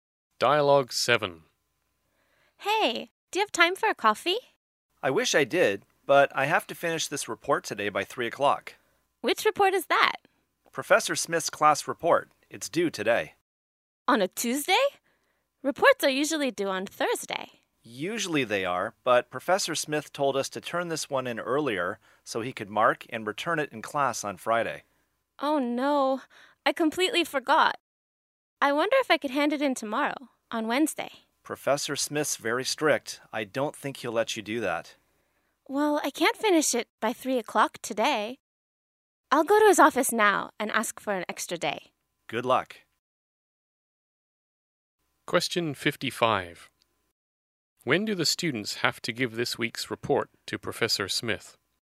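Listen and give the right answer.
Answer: Tuesday (today), by 3 o'clock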